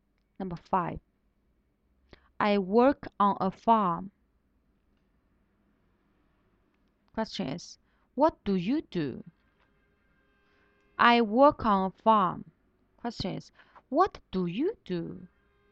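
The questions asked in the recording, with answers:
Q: what do you do?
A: I work on a farm (a farmer)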